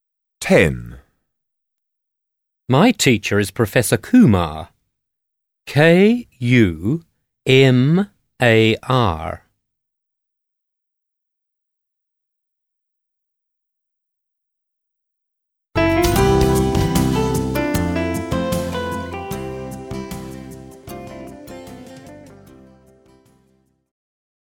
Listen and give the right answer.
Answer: Kumar